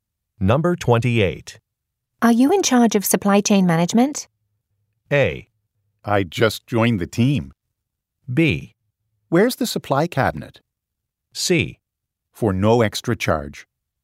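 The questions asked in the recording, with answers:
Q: Are you in charge of supply chain management?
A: A: I just joined the team.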